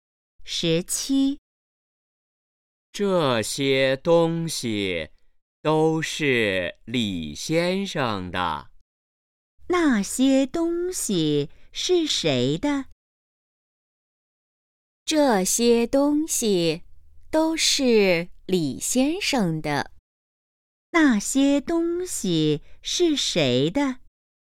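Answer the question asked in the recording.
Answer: 李先生的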